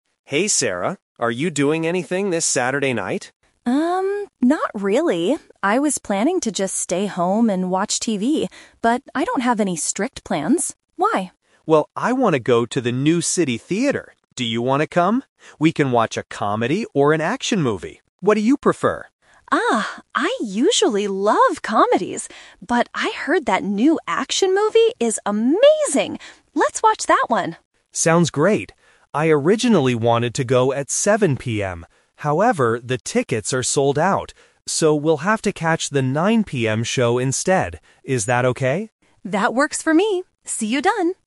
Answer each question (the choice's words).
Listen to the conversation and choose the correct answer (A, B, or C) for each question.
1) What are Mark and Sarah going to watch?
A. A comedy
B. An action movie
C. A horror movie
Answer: An action movie

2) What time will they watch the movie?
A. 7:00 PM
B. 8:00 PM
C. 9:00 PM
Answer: 9:00 PM

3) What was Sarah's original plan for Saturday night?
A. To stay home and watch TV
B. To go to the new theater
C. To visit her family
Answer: To stay home and watch TV

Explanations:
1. Sarah says she "usually loves comedies" (Option A is the trap), but she changes her mind because the new action movie is amazing. Option C is not mentioned.
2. Mark says he "originally wanted to go at 7:00 PM" (Option A is the trap), but those tickets are sold out. He uses the word "So" to give the final result: they will catch the 9:00 PM show. Option B is not mentioned.
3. At the beginning, Sarah says, "I was planning to just stay home and watch TV". Option B is the trap because going to the theater is Mark's idea and their final decision, not Sarah's original plan. Option C is not mentioned.

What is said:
Explanation: At the beginning, Sarah says, "I was planning to just stay home and watch TV".
I was planning to just stay home and watch TV, but I don't have any strict plans. Why?
Mark: Well, I want to go to the new city theater. Do you want to come? We can watch a comedy or an action movie. What do you prefer?
Sarah: Ah, I usually love comedies... but I heard that new action movie is amazing. Let's watch that one!
Mark: Sounds great. I originally wanted to go at 7:00 PM. However, the tickets are sold out. So, we'll have to catch the 9:00 PM show instead. Is that okay?